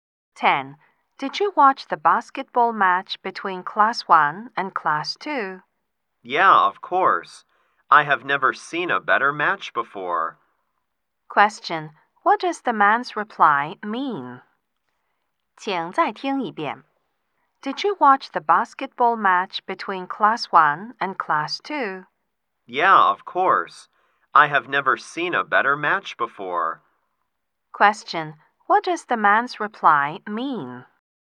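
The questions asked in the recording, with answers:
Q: What does the man's reply mean?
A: It was the best match he has ever seen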